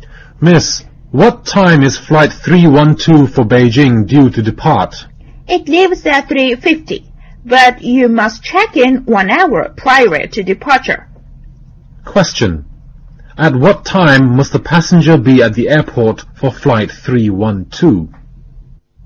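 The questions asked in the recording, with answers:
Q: At what time must the passenger be at the airport for flight 312?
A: 2:50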